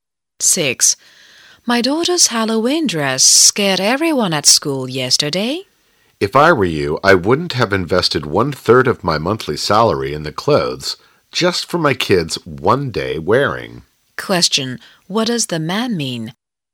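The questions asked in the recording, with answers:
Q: What does the man mean?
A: The woman spent too much money on the Halloween dress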